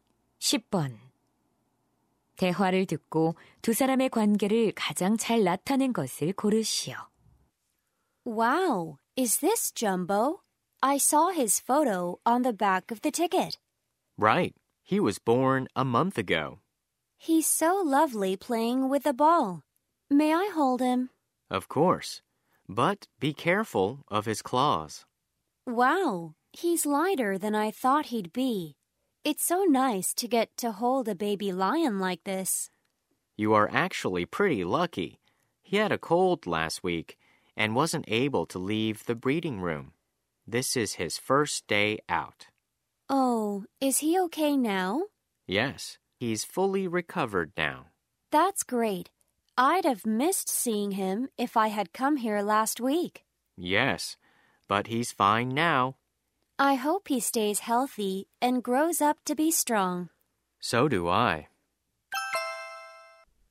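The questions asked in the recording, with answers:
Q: 대화를 듣고 두 사람의 관계를 가장 잘 나타낸 것을 고르시오.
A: 동물원 사육사 - 관람객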